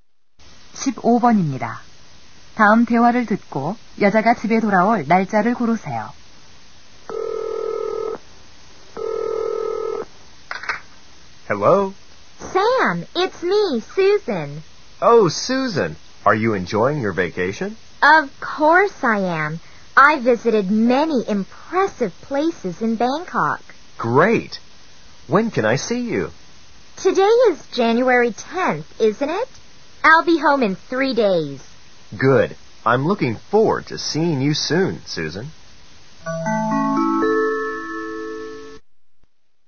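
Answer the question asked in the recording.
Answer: 1월 13일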